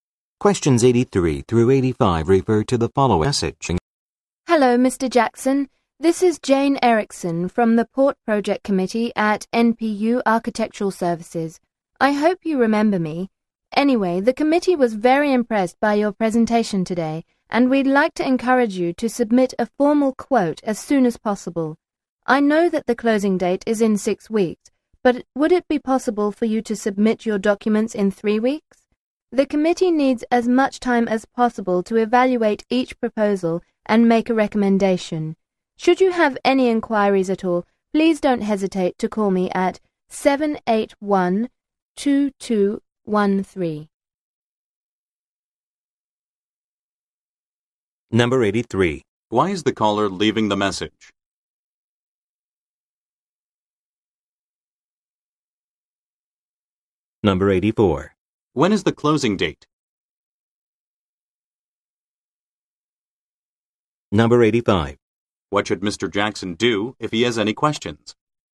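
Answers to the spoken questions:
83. To ask him to submit a formal quote early
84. In 6 weeks
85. Call Jane at 781-2213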